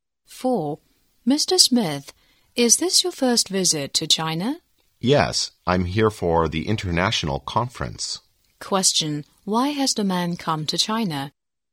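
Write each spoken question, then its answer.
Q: why has the man come to China?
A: For the international conference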